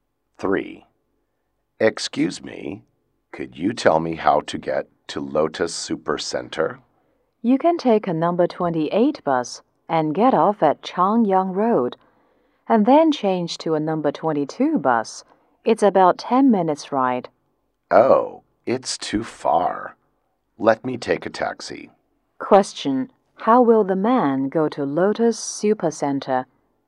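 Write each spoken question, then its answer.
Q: How will the man go to Lotus Super Center?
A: By taxi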